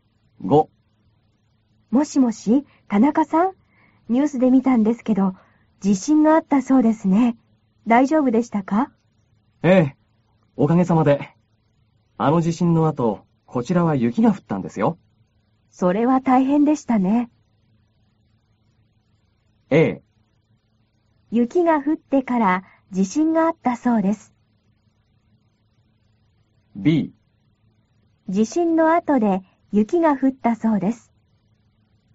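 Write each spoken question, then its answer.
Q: A。雪が降ってから地震があったそうです。B。地震の後で雪が降ったそうです。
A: B: 地震の後で雪が降ったそうです。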